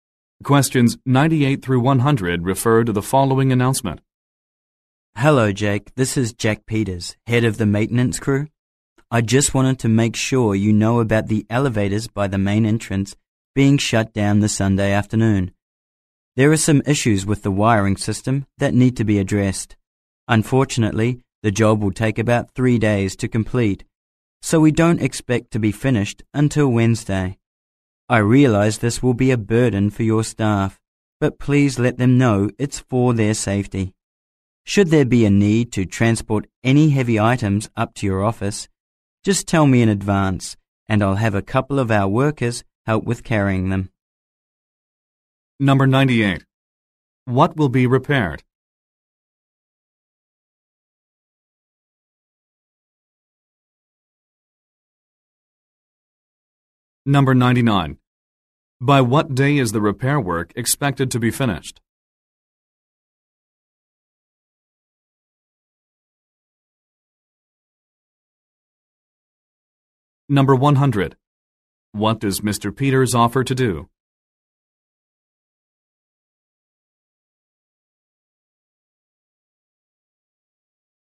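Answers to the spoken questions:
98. The elevators' wiring
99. Wednesday
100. Have workers help carry heavy items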